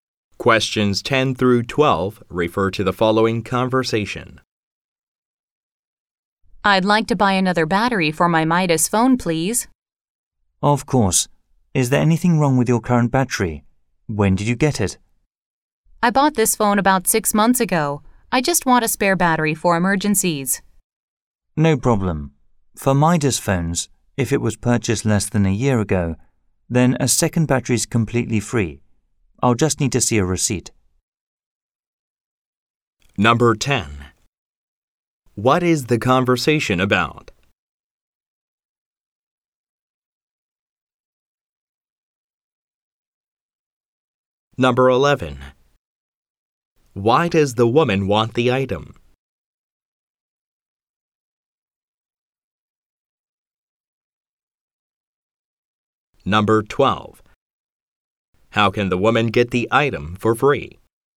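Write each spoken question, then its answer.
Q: What is the conversation about?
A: Buying a spare phone battery.

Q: Why does the woman want the item?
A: As a spare for emergencies.

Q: How can the woman get the item for free?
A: By showing a receipt proving purchase less than a year ago.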